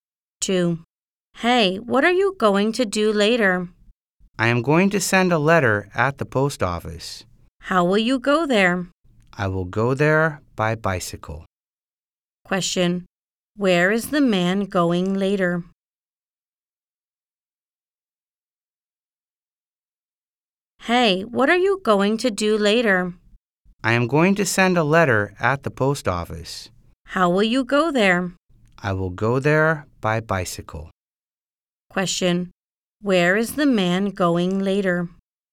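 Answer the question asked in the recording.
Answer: To the post office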